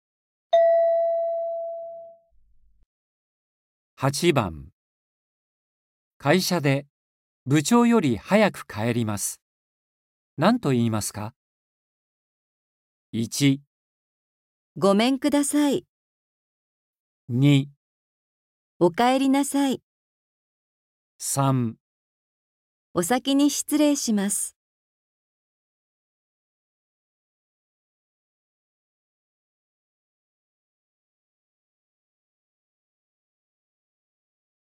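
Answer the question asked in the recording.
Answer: 3

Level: N4.35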